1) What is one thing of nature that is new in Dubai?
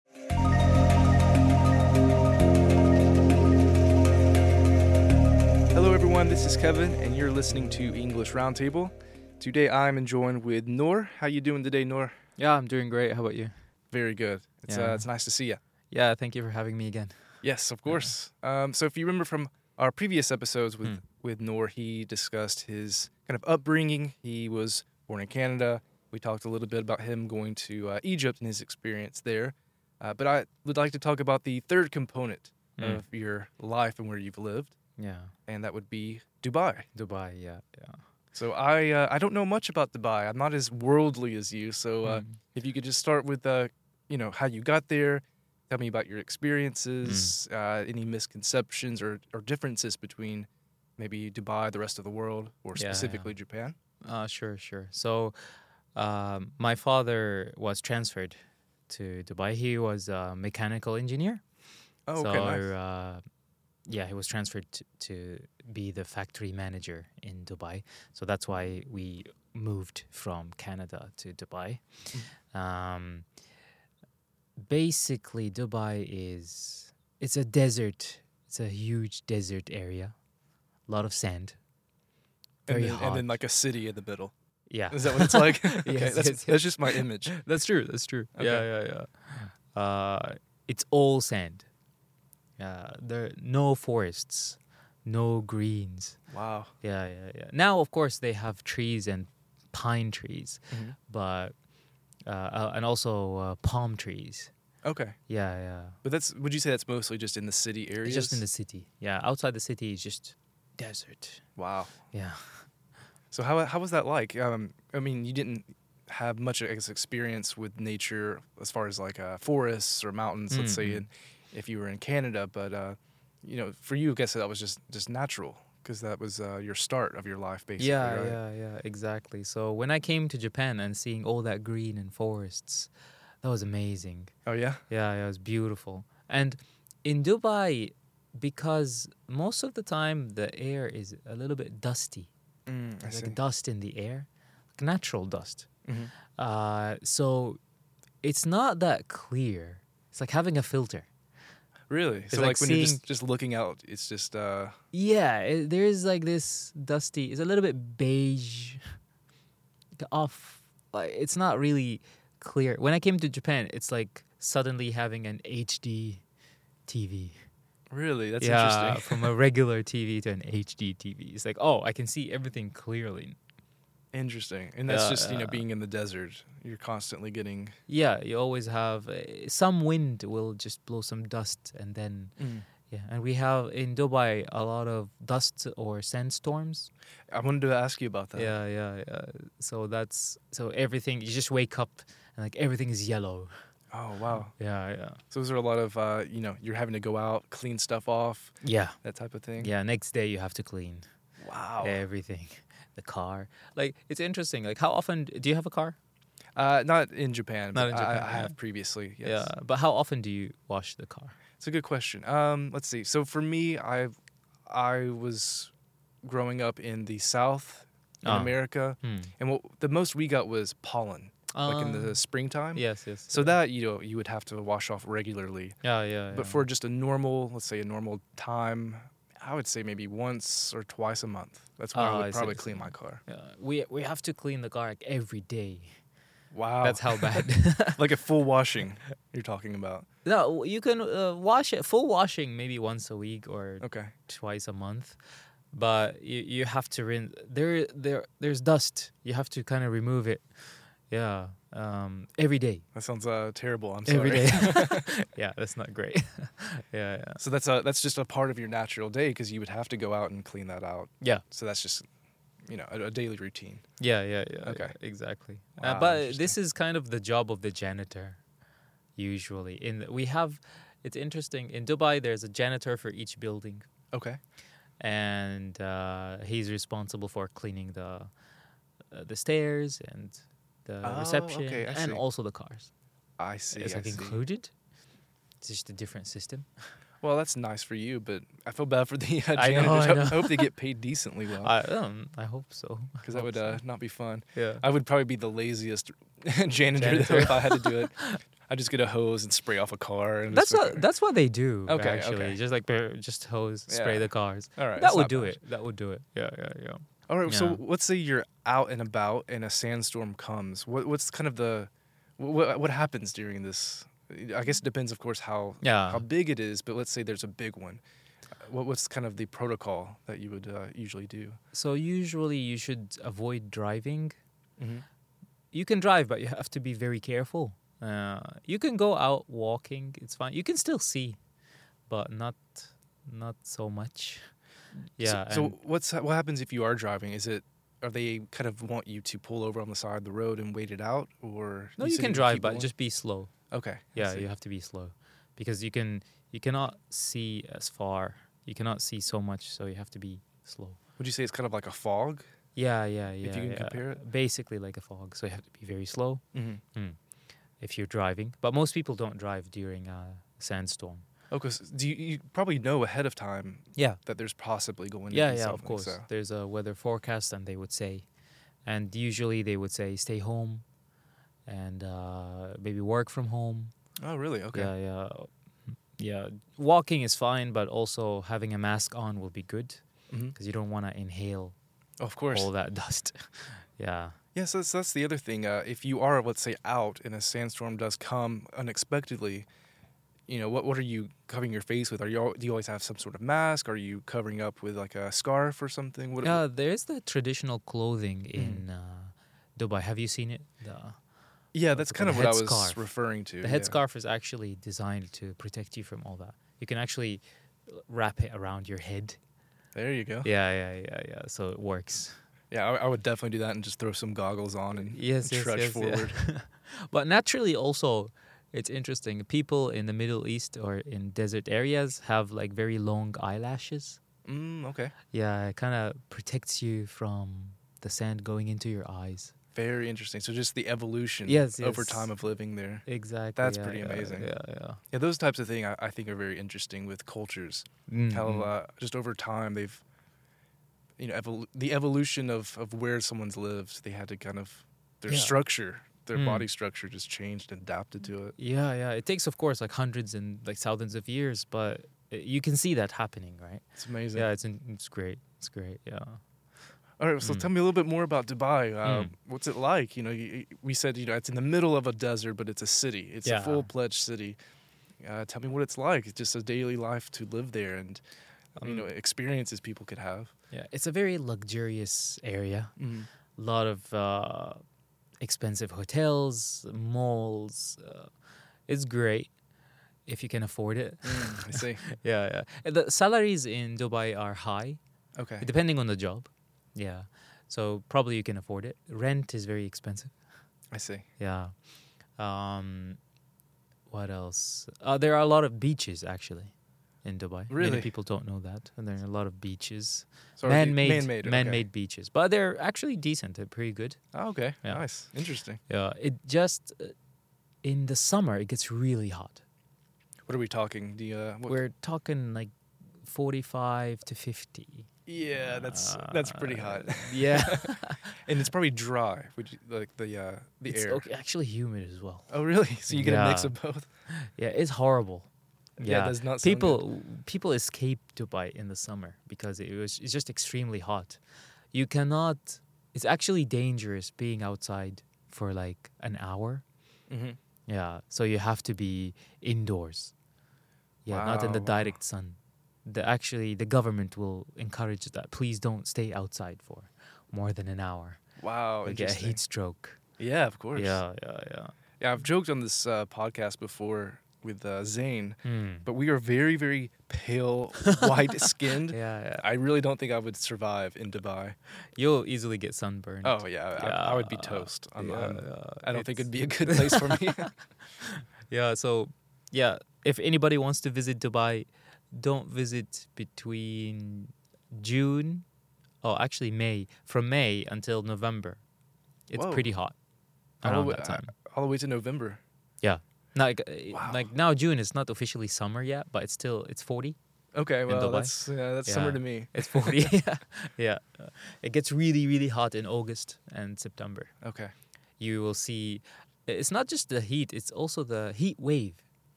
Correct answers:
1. Trees (it's a desert!)